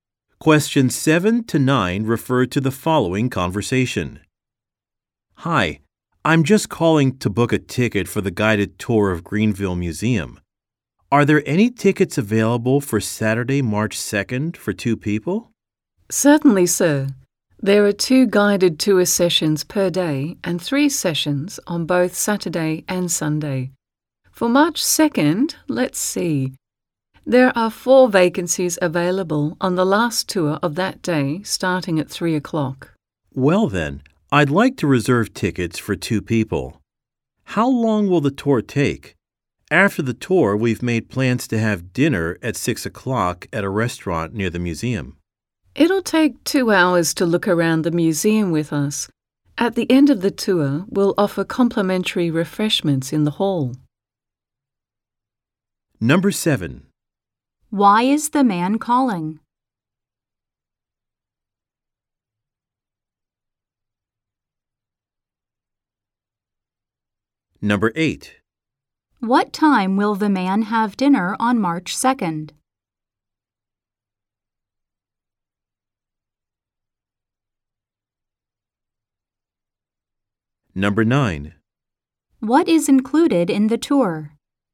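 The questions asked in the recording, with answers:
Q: Why is the man calling?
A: To book tickets for the museum's guided tour

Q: What time will the man have dinner on March 2nd?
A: At 6 o'clock

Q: What is included in the tour?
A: Complimentary refreshments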